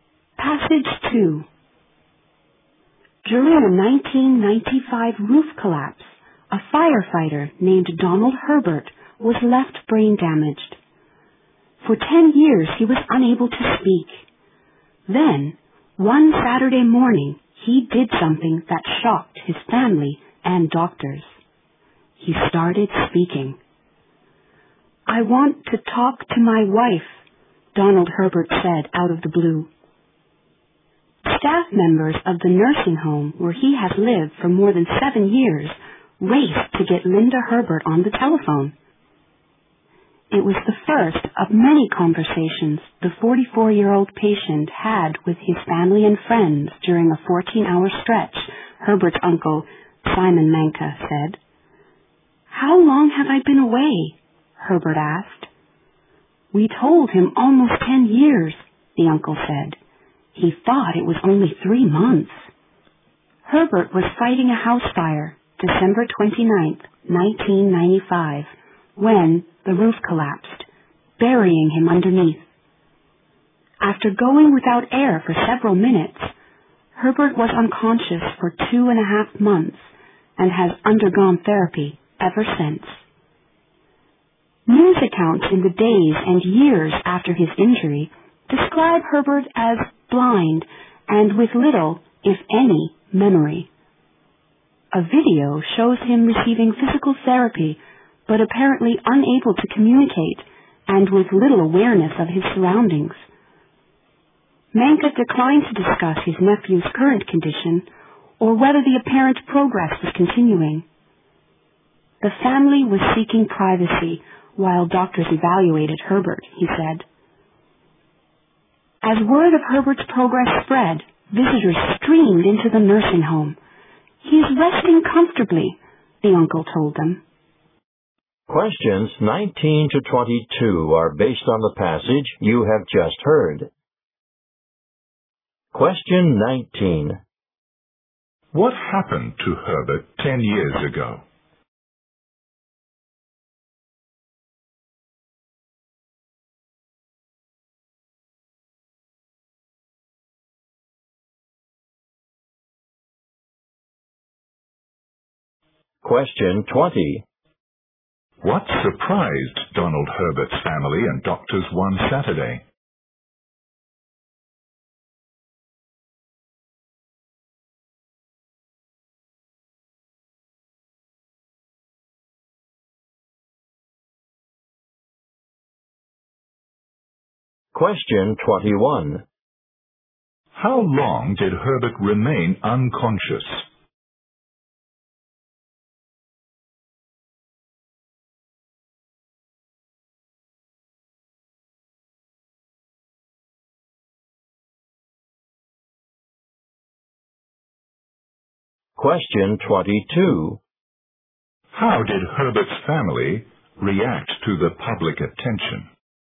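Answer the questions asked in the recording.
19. He was brain-damaged when a roof collapsed while he was fighting a fire
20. He started speaking
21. Two and a half months
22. They sought privacy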